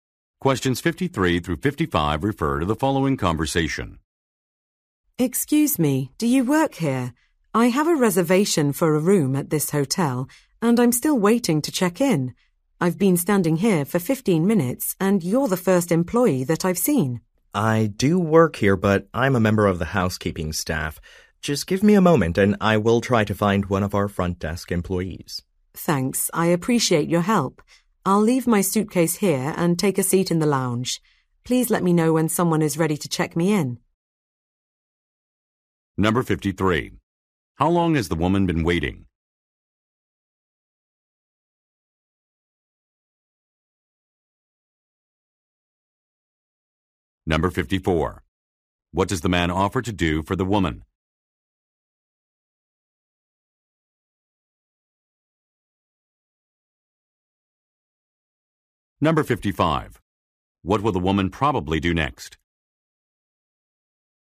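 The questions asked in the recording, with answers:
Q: How long has the woman been waiting?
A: 15 minutes

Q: What does the man offer to do for the woman?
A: Find a front desk employee

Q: What will the woman probably do next?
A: Take a seat in the lounge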